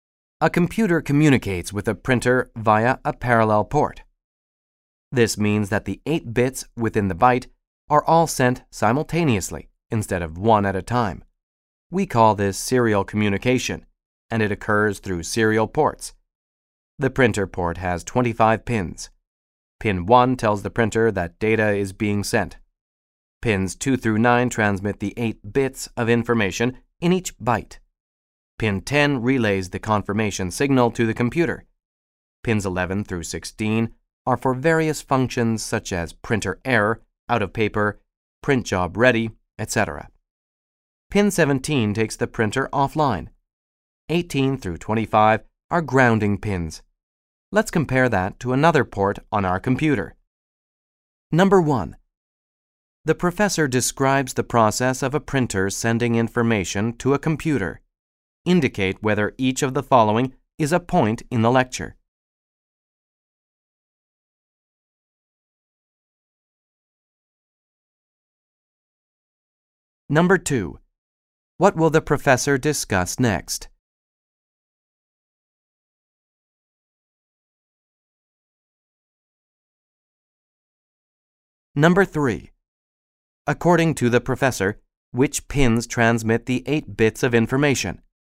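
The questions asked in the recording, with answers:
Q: What will the professor discuss next?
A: Another port on the computer

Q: According to the professor, which pins transmit the 8 bits of information?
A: Pins 2 through 9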